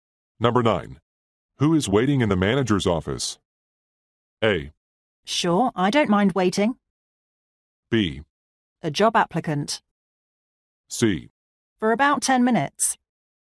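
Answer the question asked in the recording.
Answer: B: A job applicant.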